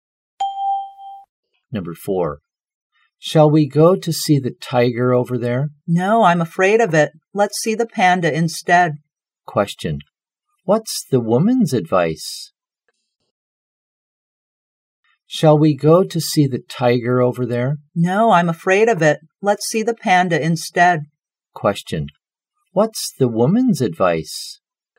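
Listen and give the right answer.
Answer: To see the panda instead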